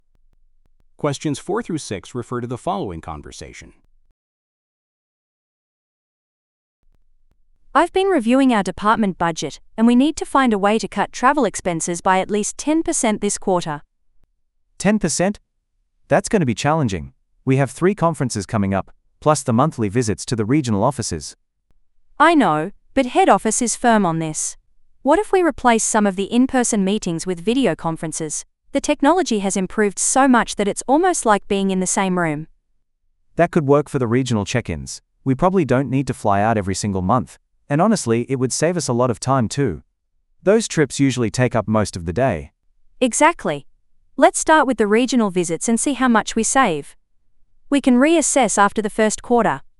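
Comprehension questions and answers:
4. What is the goal of the conversation?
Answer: To reduce spending

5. What solution is proposed?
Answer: Holding meetings remotely

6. What additional benefit does the man mention?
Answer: More efficient use of time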